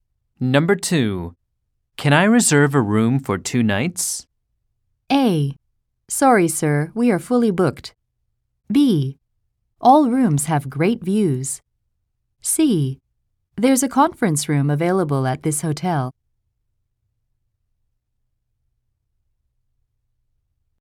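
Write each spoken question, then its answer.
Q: Can I reserve a room for 2 nights?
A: A: Sorry, sir, we are fully booked.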